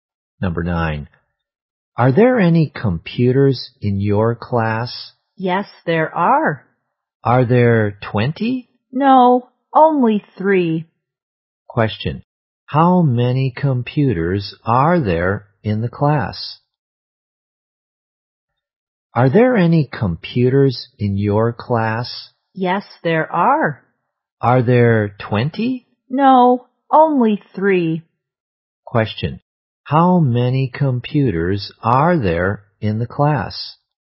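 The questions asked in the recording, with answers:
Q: How many computers are there in the class?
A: Three.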